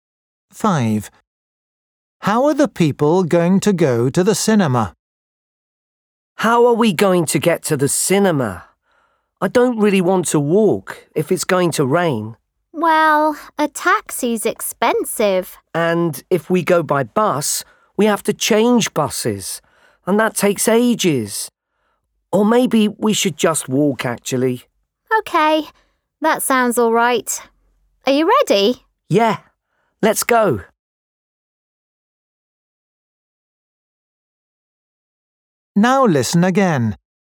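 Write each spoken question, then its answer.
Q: How are the people going to go to the cinema?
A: walk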